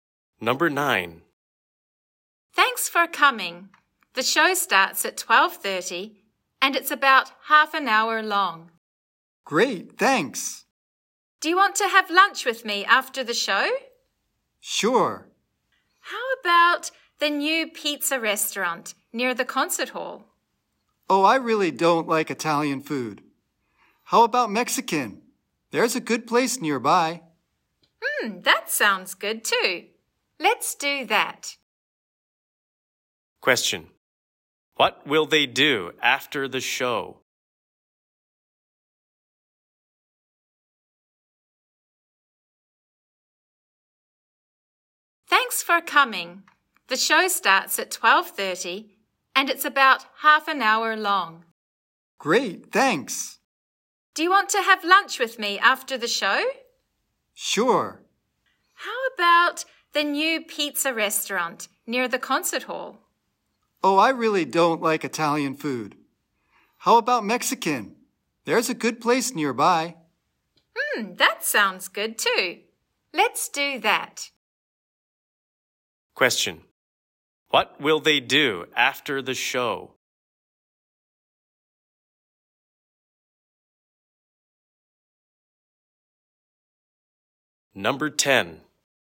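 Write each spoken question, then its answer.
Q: What will they do after the show?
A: Have lunch at a Mexican restaurant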